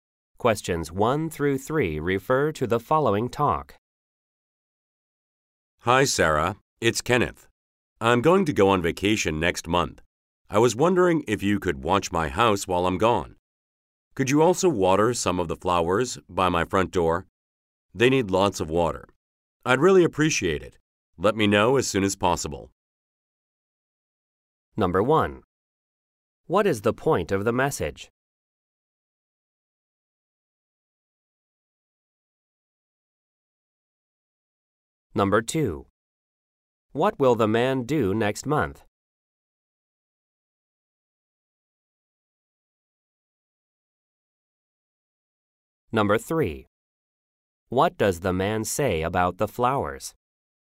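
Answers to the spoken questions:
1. To ask Sarah to watch his house while he's away.
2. Go on vacation.
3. They need lots of water.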